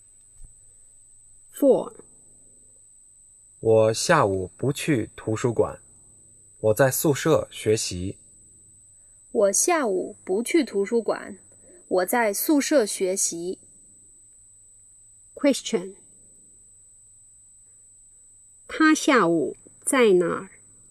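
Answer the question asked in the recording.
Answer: 在宿舍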